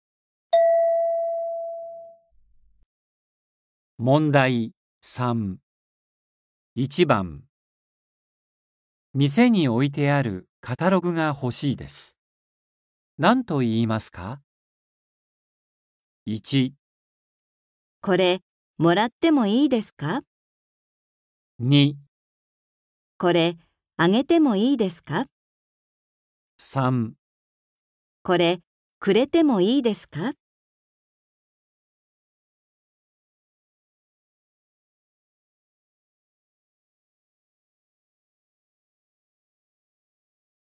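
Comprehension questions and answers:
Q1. 店に置いてあるカタログが欲しいです。何と言いますか。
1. これ、もらってもいいですか。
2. これ、あげてもいいですか。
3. これ、くれてもいいですか。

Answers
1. 1

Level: N4

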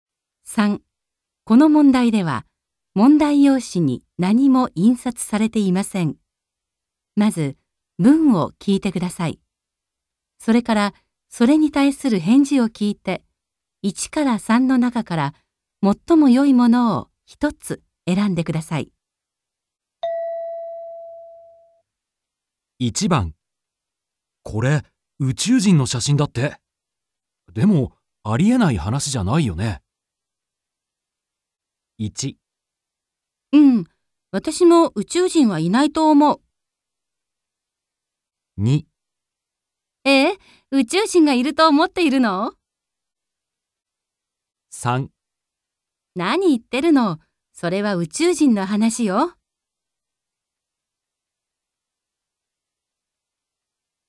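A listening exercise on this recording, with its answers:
3.この問題では、問題用紙に何も印刷されていません。まず、文を聞いてください。それから、 それに対する返事を聞いて、1から3の中から、最もよいものを一つ選んでください。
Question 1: これ、宇宙人の写真だって。でもありえない話じゃないよね。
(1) うん、私も宇宙人はいないと思う。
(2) え?宇宙人がいると思っているの?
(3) 何言ってるの、それは宇宙人の話よ。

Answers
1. 2

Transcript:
3 何言ってるの、それは宇宙人の話よ。

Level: N2

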